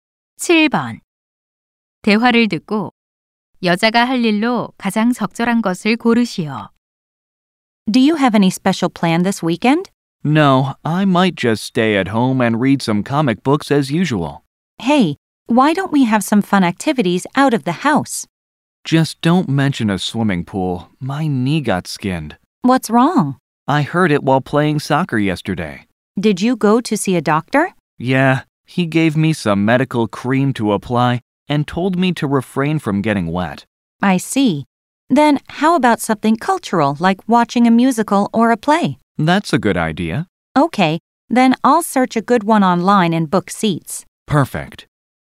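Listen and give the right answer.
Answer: 온라인으로 공연을 찾아 좌석 예매하기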